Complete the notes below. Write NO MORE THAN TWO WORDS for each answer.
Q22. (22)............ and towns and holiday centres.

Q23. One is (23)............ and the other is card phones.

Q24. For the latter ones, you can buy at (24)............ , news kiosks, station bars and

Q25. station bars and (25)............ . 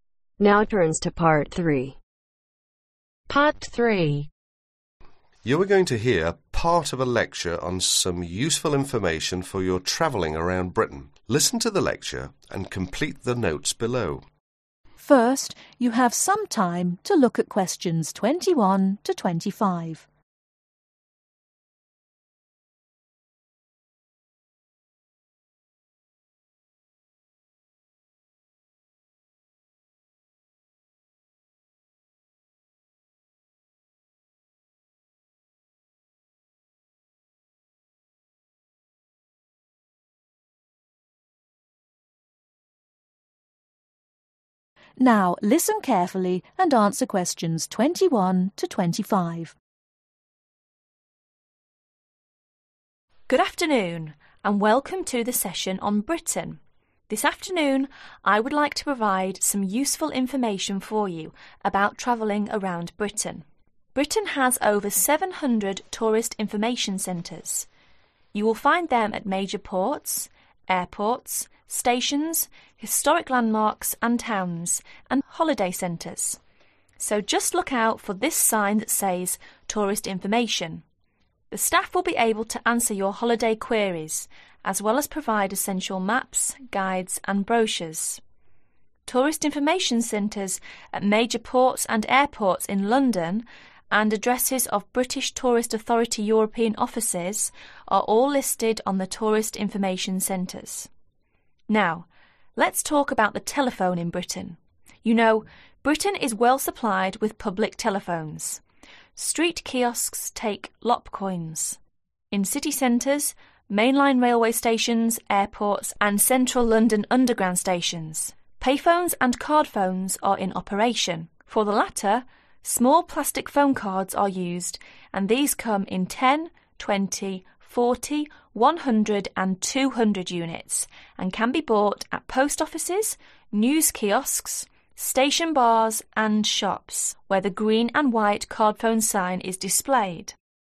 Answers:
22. Historic Landmarks
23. Payphones
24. Post Offices
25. Shops